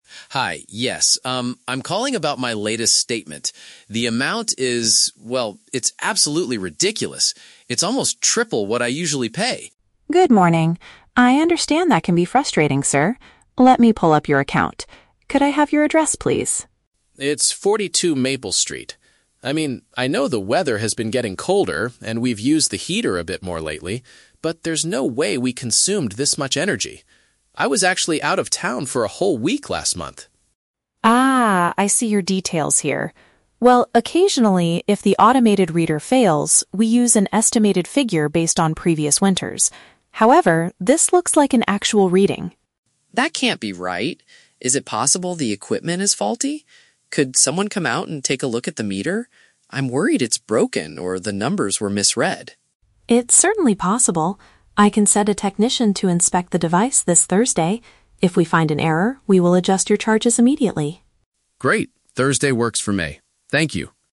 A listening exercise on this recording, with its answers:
Listen to the conversation and choose the correct answer (A, B, or C) for each question.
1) Why is the man calling the power company?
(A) To ask for a technician to fix his broken heater.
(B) To complain about a surprisingly expensive energy charge.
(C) To pay his monthly utility fee over the phone.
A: (B) To complain about a surprisingly expensive energy charge.

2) What reason does the man give to prove the charges must be wrong?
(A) He didn't use his heater at all during the winter.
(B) He was away from his home for several days last month.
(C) He recently replaced his old meter with a new one.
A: (B) He was away from his home for several days last month.

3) What is the solution agreed upon at the end of the conversation?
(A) The company will estimate his bill based on previous months.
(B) An expert will visit his house to check the equipment.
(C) The man will receive an immediate refund for his payment.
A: (B) An expert will visit his house to check the equipment.

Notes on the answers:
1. The man calls to complain that his "latest statement" is "triple what I usually pay" (paraphrased as "surprisingly expensive energy charge"). Why the trap is wrong: Option (A) is a trap. He mentions using his heater, but he does not ask anyone to fix it. He wants them to check the electricity meter.
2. The man says, "I was actually out of town for a whole week last month." Option (B) correctly paraphrases "out of town" as "away from his home" and "a whole week" as "several days." Why the trap is wrong: Option (A) is a trap. The audio mentions the heater, but the man clearly states he did use it ("we've used the heater a bit more"), not that he didn't use it at all.
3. The representative promises to send "a technician to inspect the device." Option (B) paraphrases this perfectly. Why the trap is wrong: Option (A) is a trap because the representative mentions "an estimated figure" as something they occasionally do, but notes that his current bill is an "actual reading." Option (C) is a trap because they will only adjust the charges if they find an error on Thursday, not immediately right now.

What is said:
Customer: Hi, yes. Um, I'm calling about my latest statement. The amount is... well, it's absolutely ridiculous. It's almost triple what I usually pay!
Representative: Good morning. I understand that can be frustrating, sir. Let me pull up your account. Could I have your address, please?
Customer: It's 42 Maple Street. I mean, I know the weather has been getting colder and we've used the heater a bit more lately, but there's no way we consumed this much energy. I was actually out of town for a whole week last month!
Representative: Ah, I see your details here. Well, occasionally, if the automated reader fails, we use an estimated figure based on previous winters. However, this looks like an actual reading.
Customer: That can't be right. Is it possible the equipment is faulty? Could someone come out and take a look at the meter? I'm worried it's broken or the numbers were misread.
Representative: It's certainly possible. I can send a technician to inspect the device this Thursday. If we find an error, we will adjust your charges immediately.

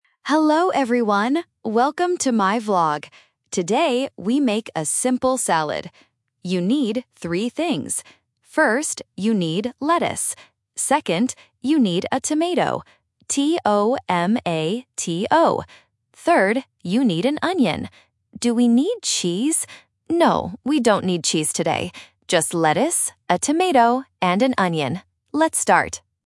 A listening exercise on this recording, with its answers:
Listen to a vlogger talking about how to make a salad and choose the correct answer (A, B, or C) for each question.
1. How many ingredients do you need for the salad?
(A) Two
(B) Three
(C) Four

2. How does the vlogger spell the second ingredient?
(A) T-A-M-A-T-O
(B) T-O-M-O-T-O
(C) T-O-M-A-T-O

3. What does the vlogger use to make the salad?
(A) Lettuce, tomato, and cheese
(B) Lettuce, tomato, and onion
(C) Lettuce, cucumber, and onion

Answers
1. (B) Three
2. (C) T-O-M-A-T-O
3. (B) Lettuce, tomato, and onion

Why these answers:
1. The vlogger clearly says, "You need three things." Option (A) Two is not mentioned. Option (C) Four is The Trap: students might hear "cheese" and count it as a fourth item, but she does not use it.
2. The vlogger spells the word for the second ingredient very clearly: "T-O-M-A-T-O". Options (A) and (B) are incorrect spellings with similar pronunciation.
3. The vlogger repeats the ingredients at the end: "Just lettuce, a tomato, and an onion." Option (A) Lettuce, tomato, and cheese is The Trap: she mentions cheese ("Do we need cheese?"), but then explicitly says "No, we don't need cheese today." Option (C) is incorrect because "cucumber" is a plausible salad ingredient but is not mentioned in the audio.

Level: A1

